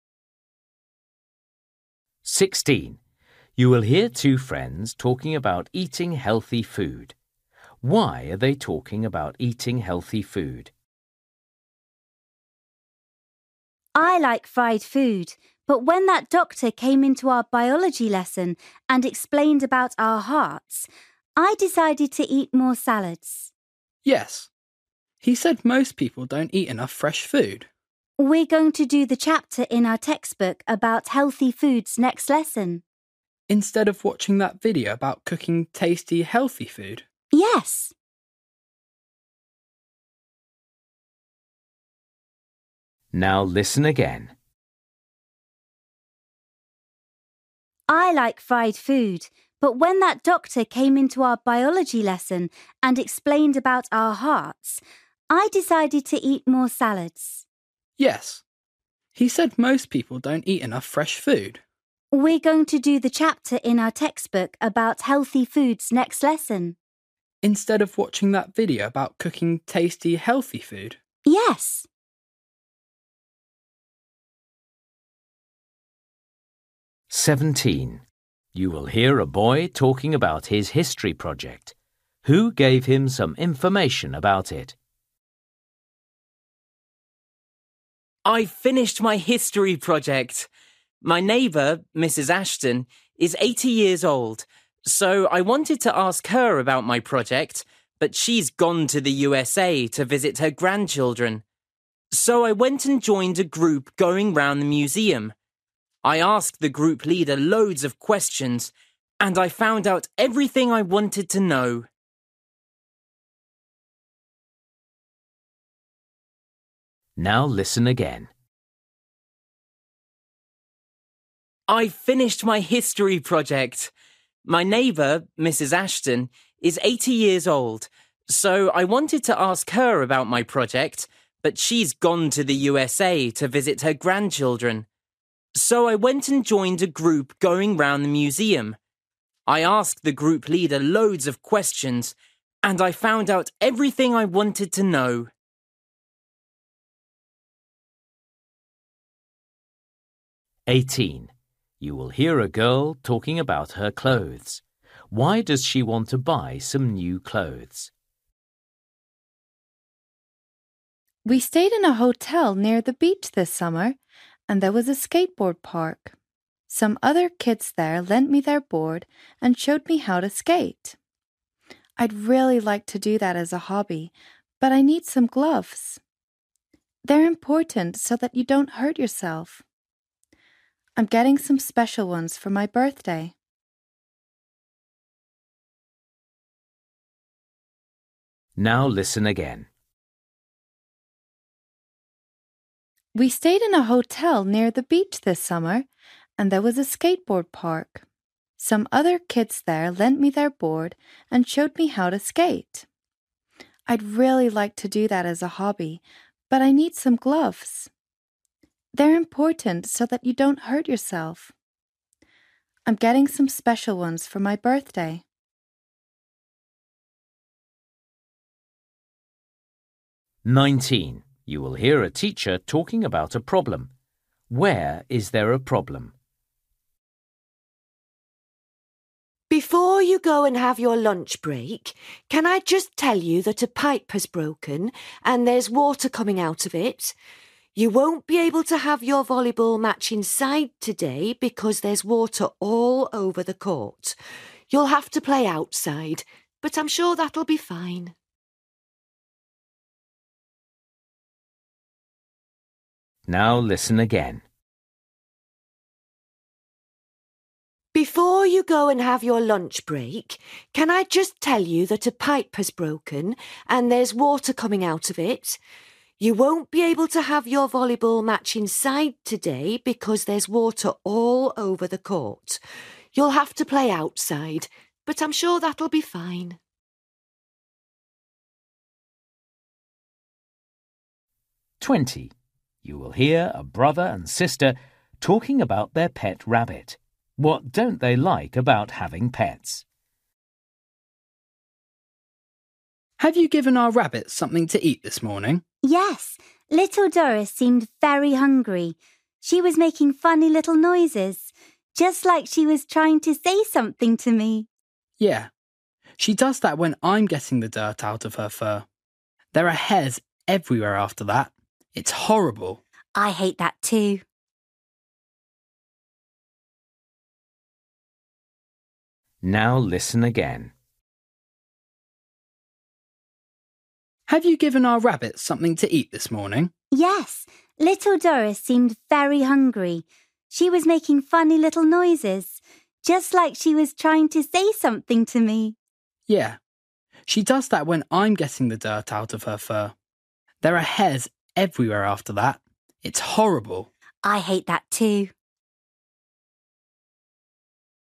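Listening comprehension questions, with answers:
For each question, choose the correct answer.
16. You will hear two friends talking about eating healthy food. Why are they talking about eating healthy food?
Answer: A doctor talked to their biology class about it

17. You will hear a boy talking about his history project. Who gave him some information about it?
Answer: A group leader at the museum

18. You will hear a girl talking about her clothes. Why does she want to buy some new clothes?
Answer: She wants to take up skateboarding as a hobby

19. You will hear a teacher talking about a problem. Where is there a problem?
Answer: On the indoor volleyball court

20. You will hear a brother and sister talking about their pet rabbit. What don't they like about having pets?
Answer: The hairs everywhere after cleaning its fur

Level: Luyện nghe trình độ A2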